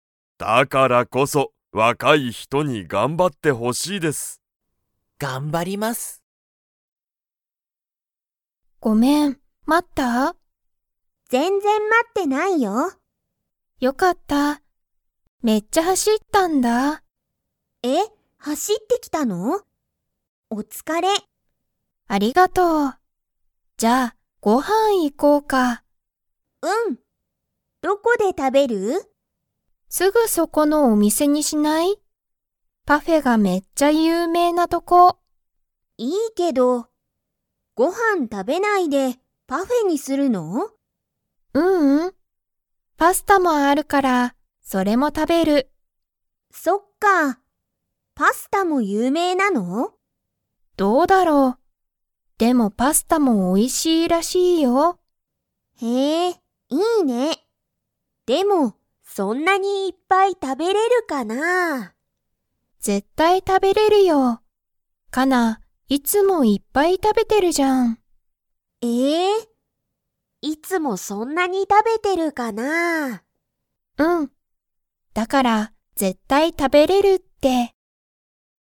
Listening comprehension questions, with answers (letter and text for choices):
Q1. そのお店(みせ)は、パフェが____。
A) すごく安(やす)い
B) あまりおいしくない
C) すぐそこだ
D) めっちゃ有名ゆうめいだ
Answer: D) めっちゃ有名ゆうめいだ

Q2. ナナコとカナは、パフェだけ食(た)べますか?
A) はい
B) いいえ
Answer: B) いいえ